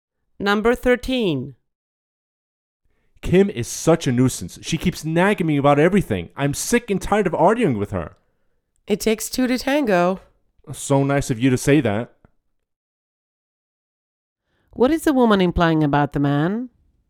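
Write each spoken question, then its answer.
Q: What is the woman implying about the man?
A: He is also to blame for the arguments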